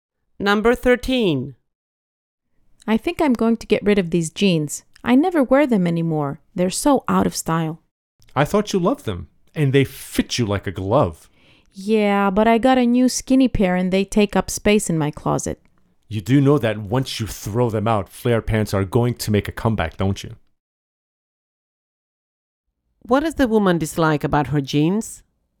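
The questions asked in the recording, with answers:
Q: What does the woman dislike about her jeans?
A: They are out of style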